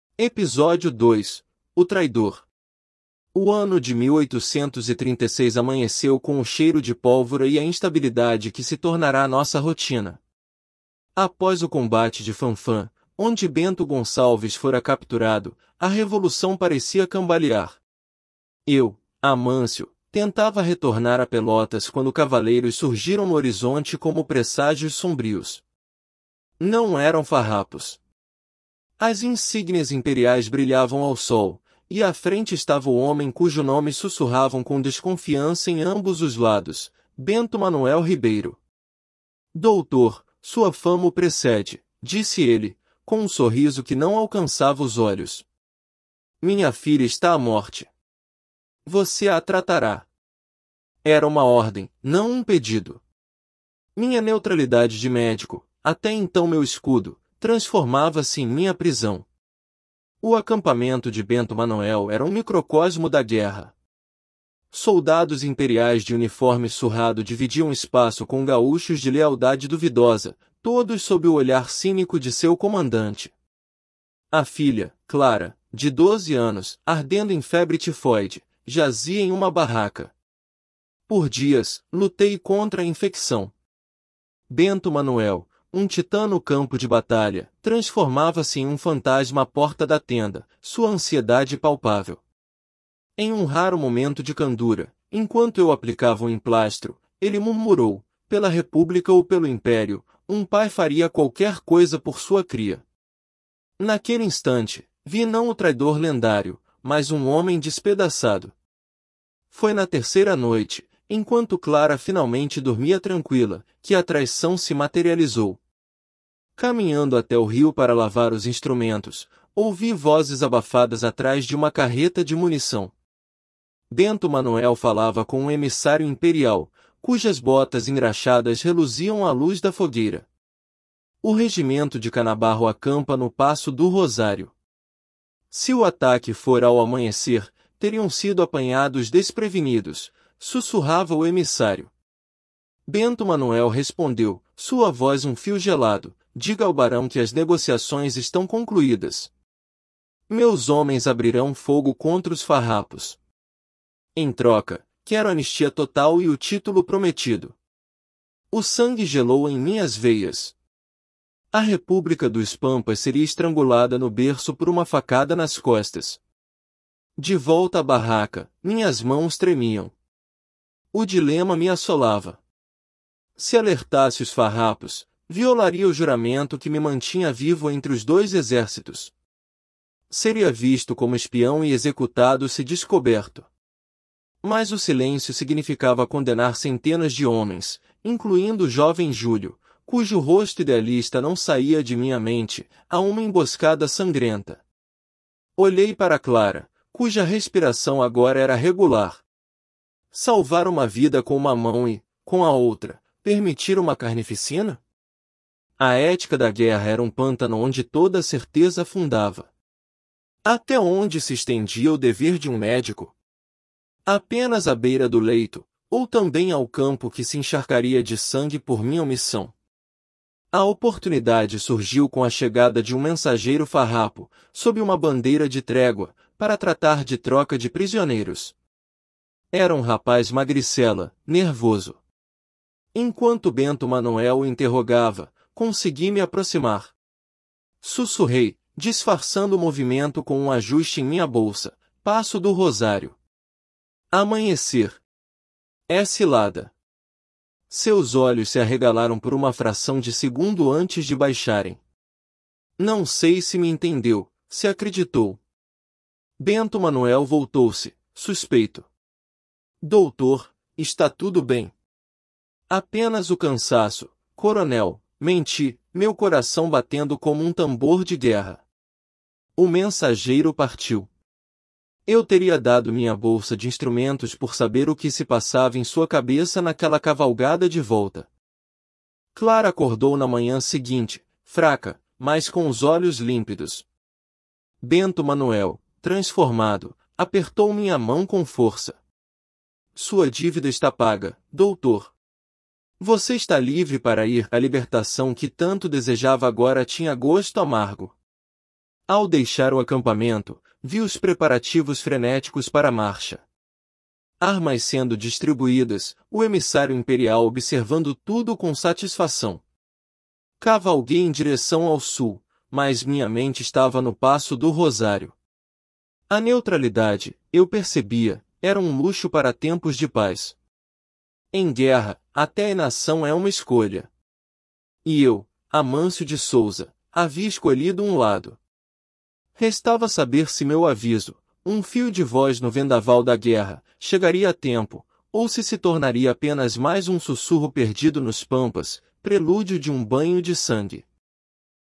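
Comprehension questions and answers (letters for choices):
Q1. Qual era a profissão de Amâncio e como isso influenciou sua posição inicial no conflito?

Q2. Por que Bento Manuel Ribeiro era visto com desconfiança por ambos os lados da guerra?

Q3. Qual foi o dilema moral central que Amâncio enfrentou após ouvir o plano de traição?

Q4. Como a relação de Bento Manuel com sua filha Clara humanizou o personagem aos olhos de Amâncio?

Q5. Qual foi o método que Amâncio usou para tentar alertar os farrapos sobre a emboscada?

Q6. O que Amâncio percebeu sobre o conceito de neutralidade ao final da história?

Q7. Em que ano e contexto histórico se passa a história?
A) 1822, durante a Independência do Brasil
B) 1836, durante a Revolução Farroupilha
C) 1848, durante a Revolução Praieira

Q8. Qual era a condição médica da filha de Bento Manuel?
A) Varíola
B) Febre tifóide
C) Tuberculose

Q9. O que Bento Manuel prometeu fazer em troca da anistia e do título imperial?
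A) Entregar o acampamento de Bento Gonçalves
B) Abrir fogo contra os farrapos no Passo do Rosário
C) Convencer outros líderes a se renderem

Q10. Qual personagem farrapo é mencionado especificamente na mente de Amâncio quando ele pensa nas vidas em risco?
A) Bento Gonçalves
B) Júlio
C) Canabarro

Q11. Como Amâncio se sentiu quando finalmente recebeu sua liberdade para partir?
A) Aliviado e vitorioso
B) Amargo e preocupado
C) Indiferente e cansado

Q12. Qual era a incerteza final que permanecia com Amâncio ao deixar o acampamento?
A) Se Clara se recuperaria completamente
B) Se Bento Manuel cumpriria sua parte do acordo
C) Se seu aviso chegaria a tempo aos farrapos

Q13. Bento Gonçalves estava presente e comandando o acampamento de Bento Manuel no início da história.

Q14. Amâncio foi capturado por Bento Manuel enquanto tentava retornar a Pelotas.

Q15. O emissário imperial que negociou com Bento Manuel era o Barão.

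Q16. Amâncio revelou abertamente a traição de Bento Manuel na frente de todos no acampamento.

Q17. A história termina com a certeza de que o aviso de Amâncio salvou os farrapos da emboscada.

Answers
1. Era médico; sua neutralidade de médico o protegia entre os dois lados, mas virou sua prisão, pois foi obrigado a tratar a filha de Bento Manuel.
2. Porque mudava de lado (trocava de casaca) e era considerado traidor.
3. Alertar os farrapos e violar seu juramento de neutralidade, arriscando ser executado como espião, ou calar e condenar centenas de homens a uma emboscada.
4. Sua ansiedade de pai mostrou um homem despedaçado que faria qualquer coisa pela filha, não o traidor lendário.
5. Sussurrou um aviso ao mensageiro farrapo, disfarçando o movimento com um ajuste na bolsa.
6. Que a neutralidade é um luxo para tempos de paz; na guerra até a inação é uma escolha.
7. B
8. B
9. B
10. B
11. 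B
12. C
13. Falso
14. Verdadeiro
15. Falso
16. Falso
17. Falso

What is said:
O ano de 1836 amanheceu com o cheiro de pólvora e a instabilidade que se tornara nossa rotina. Após o combate de Fanfa, onde Bento Gonçalves fora capturado, a revolução parecia cambalear. Eu, Amâncio, tentava retornar a Pelotas quando cavaleiros surgiram no horizonte como presságios sombrios. Não eram farrapos. As insígnias imperiais brilhavam ao sol, e à frente estava o homem cujo nome sussurravam com desconfiança em ambos os lados: Bento Manuel Ribeiro. 'Doutor, sua fama o precede', disse ele, com um sorriso que não alcançava os olhos. 'Minha filha está à morte. Você a tratará.' Era uma ordem, não um pedido. Minha neutralidade de médico, até então meu escudo, transformava-se em minha prisão.
O acampamento de Bento Manuel era um microcosmo da guerra. Soldados imperiais de uniforme surrado dividiam espaço com gaúchos de lealdade duvidosa, todos sob o olhar cínico de seu comandante. 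A filha, Clara, de doze anos, ardendo em febre tifóide, jazia em uma barraca. Por dias, lutei contra a infecção. Bento Manuel, um titã no campo de batalha, transformava-se em um fantasma à porta da tenda, sua ansiedade palpável. Em um raro momento de candura, enquanto eu aplicava um emplastro, ele murmurou: 'Pela república ou pelo Império, um pai faria qualquer coisa por sua cria.' Naquele instante, vi não o traidor lendário, mas um homem despedaçado.
Foi na terceira noite, enquanto Clara finalmente dormia tranquila, que a traição se materializou. Caminhando até o rio para lavar os instrumentos, ouvi vozes abafadas atrás de uma carreta de munição. Bento Manuel falava com um emissário imperial, cujas botas engraxadas reluziam à luz da fogueira. '...o regimento de Canabarro acampa no Passo do Rosário. Se o ataque for ao amanhecer, teriam sido apanhados desprevenidos', sussurrava o emissário. 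Bento Manuel respondeu, sua voz um fio gelado: 'Diga ao Barão que as negociações estão concluídas. Meus homens abrirão fogo contra os farrapos. Em troca, quero anistia total e o título prometido.' O sangue gelou em minhas veias. A república dos pampas seria estrangulada no berço por uma facada nas costas.
De volta à barraca, minhas mãos tremiam. O dilema me assolava. Se alertasse os farrapos, violaria o juramento que me mantinha vivo entre os dois exércitos. Seria visto como espião e executado se descoberto. Mas o silêncio significava condenar centenas de homens – incluindo o jovem Júlio, cujo rosto idealista não saía de minha mente – a uma emboscada sangrenta. Olhei para Clara, cuja respiração agora era regular. Salvar uma vida com uma mão e, com a outra, permitir uma carnificina? A ética da guerra era um pântano onde toda certeza afundava. Até onde se estendia o dever de um médico? Apenas à beira do leito, ou também ao campo que se encharcaria de sangue por minha omissão?
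A oportunidade surgiu com a chegada de um mensageiro farrapo, sob uma bandeira de trégua, para tratar de troca de prisioneiros. Era um rapaz magricela, nervoso. Enquanto Bento Manuel o interrogava, consegui me aproximar. Sussurrei, disfarçando o movimento com um ajuste em minha bolsa: 'Passo do Rosário. Amanhecer. É cilada.' Seus olhos se arregalaram por uma fração de segundo antes de baixarem. Não sei se me entendeu, se acreditou. Bento Manuel voltou-se, suspeito. 'Doutor, está tudo bem?' 'Apenas o cansaço, coronel', menti, meu coração batendo como um tambor de guerra. O mensageiro partiu. Eu teria dado minha bolsa de instrumentos por saber o que se passava em sua cabeça naquela cavalgada de volta.
Clara acordou na manhã seguinte, fraca, mas com os olhos límpidos. Bento Manuel, transformado, apertou minha mão com força. 'Sua dívida está paga, Doutor. Você está livre para ir.' A libertação que tanto desejava agora tinha gosto amargo. 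Ao deixar o acampamento, vi os preparativos frenéticos para a marcha. Armas sendo distribuídas, o emissário imperial observando tudo com satisfação. Cavalguei em direção ao sul, mas minha mente estava no Passo do Rosário. A neutralidade, eu percebia, era um luxo para tempos de paz. Em guerra, até a inação é uma escolha. E eu, Amâncio de Souza, havia escolhido um lado. Restava saber se meu aviso, um fio de voz no vendaval da guerra, chegaria a tempo, ou se se tornaria apenas mais um sussurro perdido nos pampas, prelúdio de um banho de sangue.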